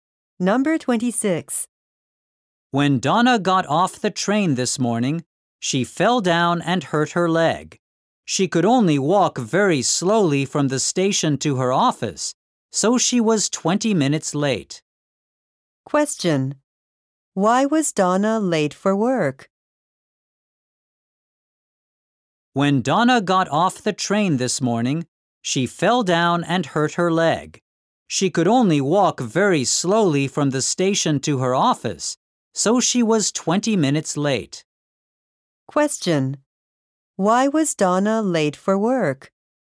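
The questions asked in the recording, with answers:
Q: Why was Donna late for work?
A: She hurt her leg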